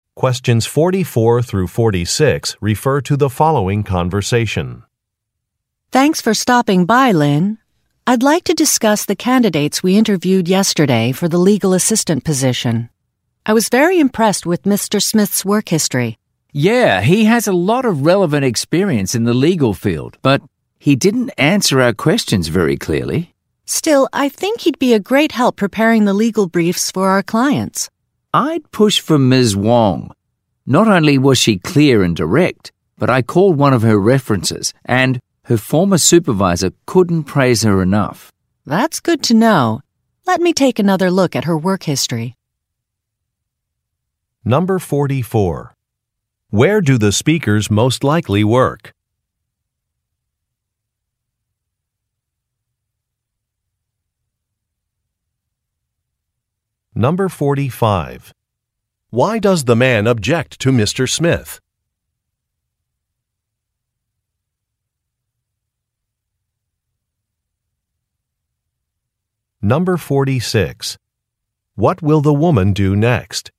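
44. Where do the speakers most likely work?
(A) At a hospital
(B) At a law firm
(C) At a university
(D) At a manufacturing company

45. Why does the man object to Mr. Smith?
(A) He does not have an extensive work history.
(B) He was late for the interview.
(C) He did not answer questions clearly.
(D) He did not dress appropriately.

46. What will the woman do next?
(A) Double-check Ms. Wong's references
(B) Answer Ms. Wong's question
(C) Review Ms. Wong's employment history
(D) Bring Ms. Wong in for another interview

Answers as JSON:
{"44": "B", "45": "C", "46": "C"}

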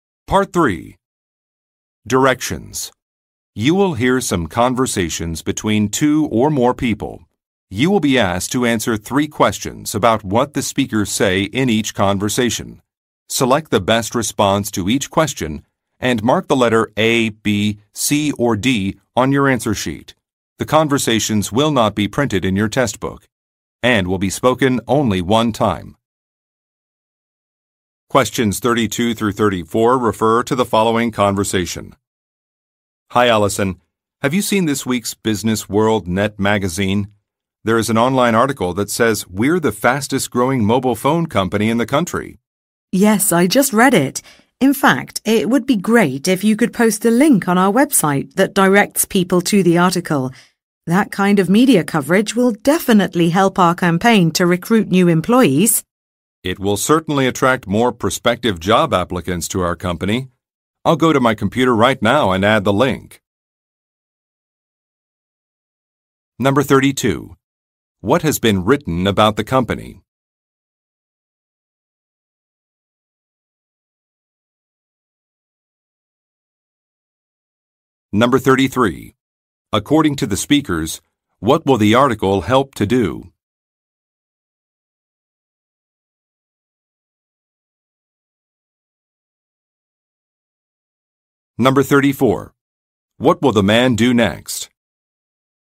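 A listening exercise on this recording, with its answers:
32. What has been written about the company?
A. It received an award.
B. It is growing quickly.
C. It will relocate soon.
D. It has launched a new product.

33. According to the speakers, what will the article help to do?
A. Increase job applications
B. Lower operating costs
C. Improve staff training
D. Attract international customers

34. What will the man do next?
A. Revise a schedule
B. Post a job opening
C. Send an email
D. Update a Web site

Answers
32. B
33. A
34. D

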